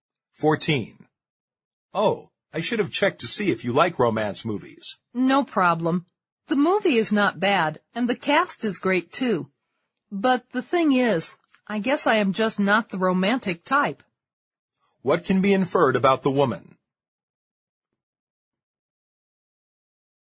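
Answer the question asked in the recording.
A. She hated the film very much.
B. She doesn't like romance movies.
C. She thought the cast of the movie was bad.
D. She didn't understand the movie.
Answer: B. She doesn't like romance movies.

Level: 六级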